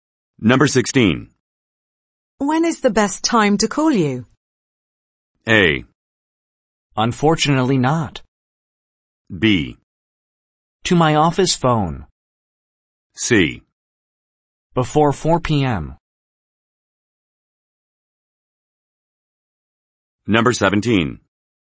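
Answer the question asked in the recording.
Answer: C: Before 4 p.m.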